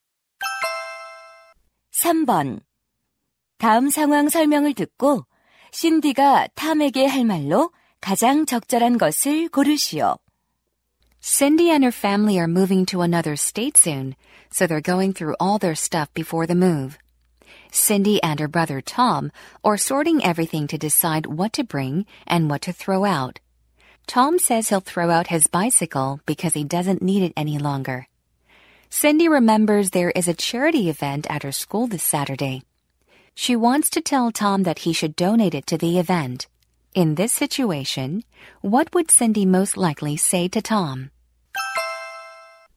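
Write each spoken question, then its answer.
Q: In this situation, what would Cindy most likely say to Tom?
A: Why don't you donate your bicycle to the school charity event?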